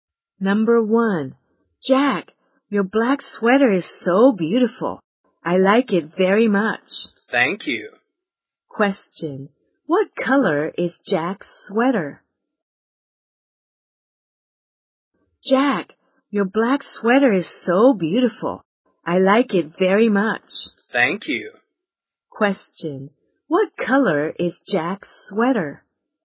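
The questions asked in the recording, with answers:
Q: what color is Jack's sweater?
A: Black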